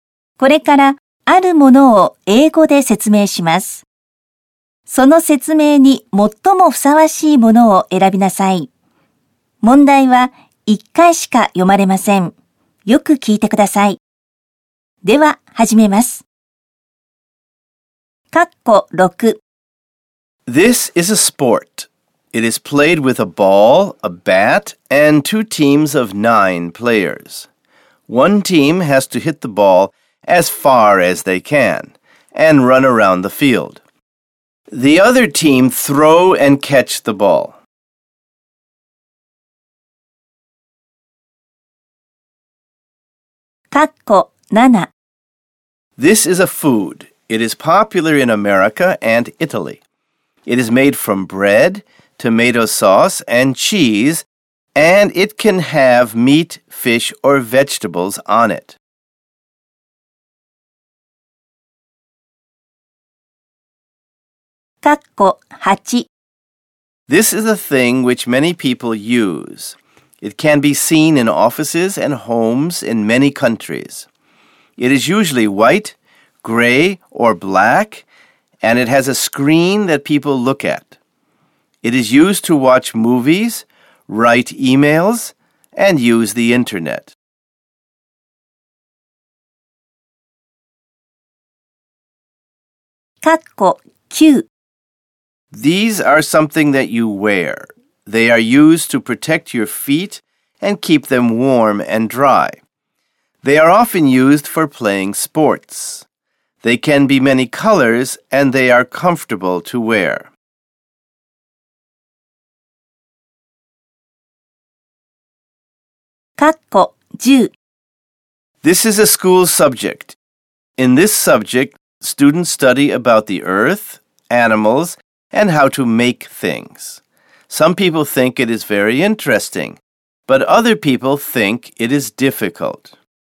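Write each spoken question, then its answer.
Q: This is a sport. It is played with a ball, a bat, and two teams of nine players.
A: Baseball

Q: This is a food. It is popular in America and Italy.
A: Pizza

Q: This is a thing which many people use.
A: A computer

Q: This is a school subject.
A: Science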